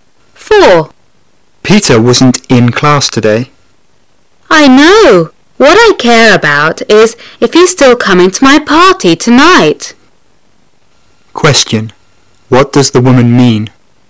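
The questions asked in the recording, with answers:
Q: What does the woman mean?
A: She only cares whether Peter comes to her party.

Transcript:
[解析] Man: Peter wasn't in class today. Woman: I know. What I care about is if he's still coming to my party tonight. Question: What does the woman mean?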